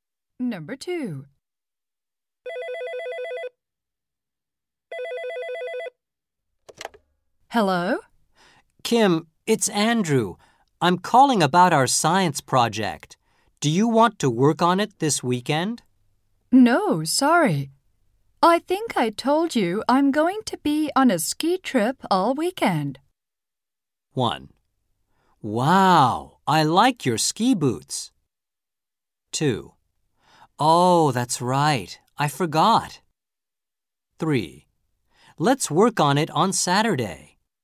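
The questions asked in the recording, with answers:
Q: No, sorry.I think I told you I'm going to be on a ski trip all weekend.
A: 2: Oh, that's right, I forgot.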